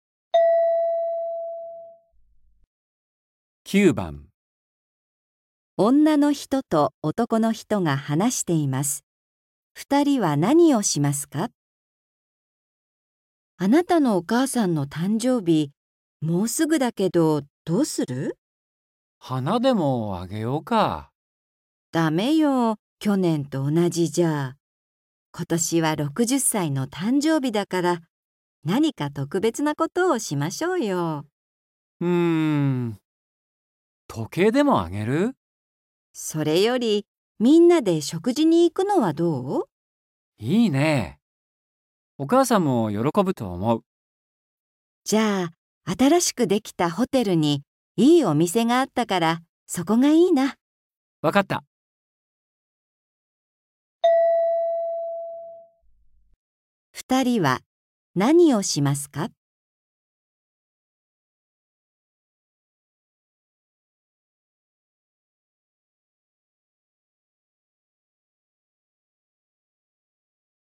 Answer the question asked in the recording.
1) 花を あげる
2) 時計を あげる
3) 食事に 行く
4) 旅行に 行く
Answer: 3) 食事に 行く

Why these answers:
F : それより、みんなで食事に行くのはどう? M : いいね。お母さんも喜ぶと思う。

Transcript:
F: あなたのお母さんの誕生日、もうすぐだけど、どうする?
M : 花でもあげようか。
F : だめよ、去年と同じじゃ。今年は60歳の誕生日だから、何か特別なことをしましょうよ。
M : うーん。時計でもあげる?
F : それより、みんなで食事に行くのはどう?
M : いいね。お母さんも喜ぶと思う。
F : じゃあ、新しくできたホテルにいいお店があったから、そこがいいな。
M : わかった。

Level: 初級